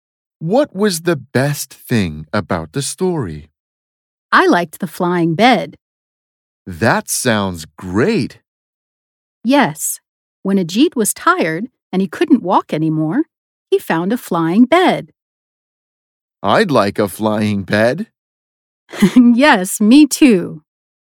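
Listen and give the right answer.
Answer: Ajit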